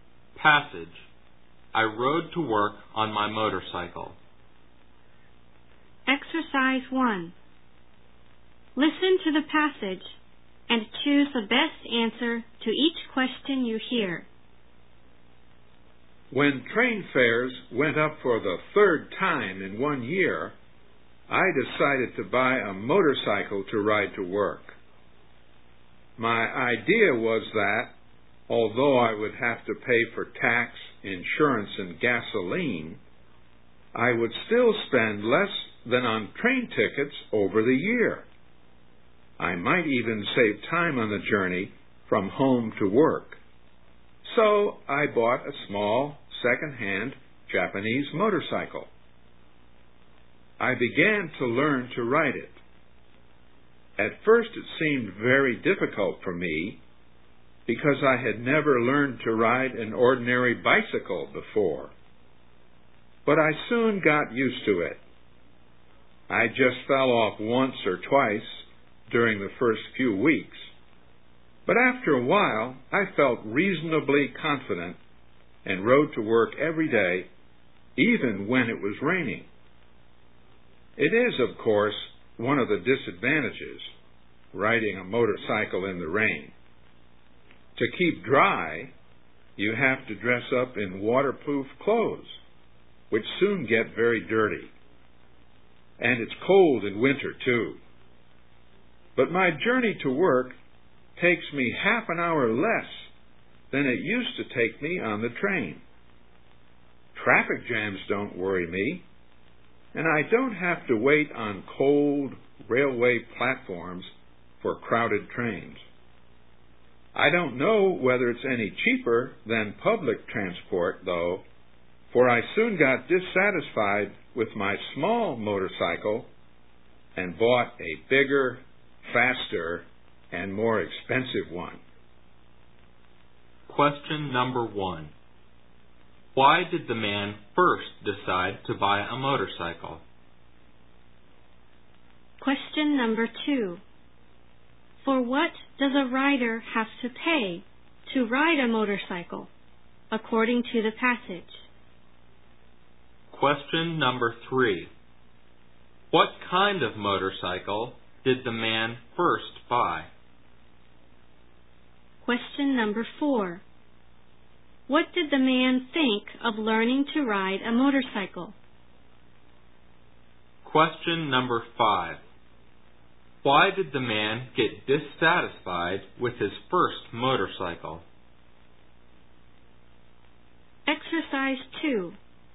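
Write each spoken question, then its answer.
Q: Why did the man first decide to buy a motorcycle?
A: Train fares went up for the third time in a year

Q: For what does a rider have to pay to ride a motorcycle, according to the passage?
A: Tax, insurance and gasoline

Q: What kind of motorcycle did the man first buy?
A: A small, second-hand Japanese one

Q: What did the man think of learning to ride a motorcycle?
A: Very difficult at first, but he soon got used to it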